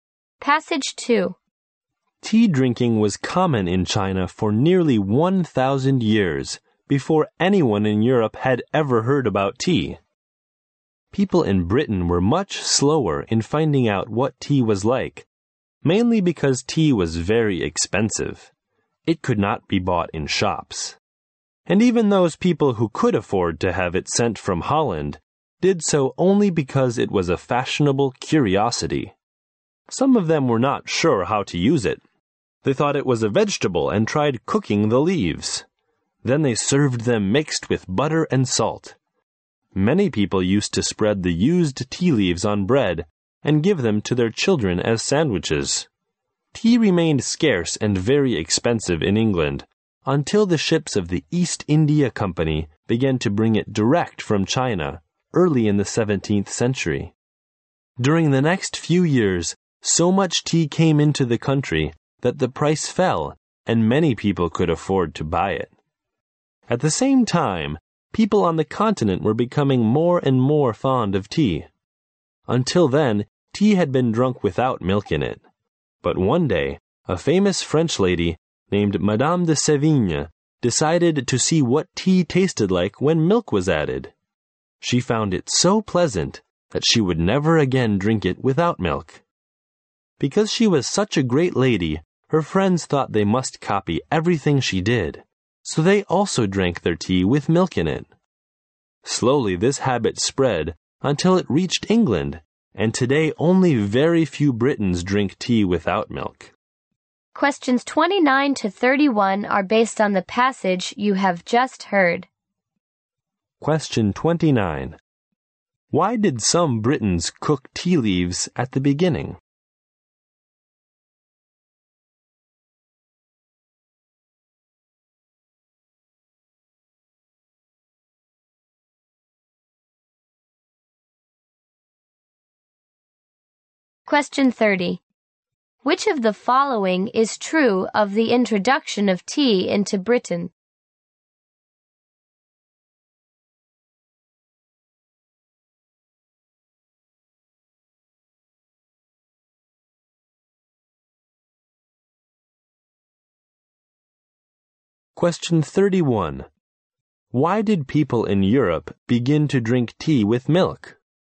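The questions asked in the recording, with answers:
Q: Why did some Britons cook tea leaves at the beginning?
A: They thought tea was a vegetable.

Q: Which of the following is true of the introduction of tea into Britain?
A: It stayed scarce and expensive until East India Company ships brought it directly from China, and then the price fell.

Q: Why did people in Europe begin to drink tea with milk?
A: They copied Madame de Sévigné.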